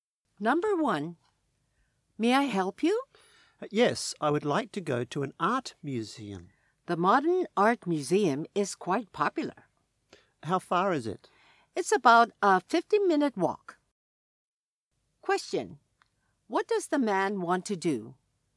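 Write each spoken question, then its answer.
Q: What does the man want to do?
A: Go to an art museum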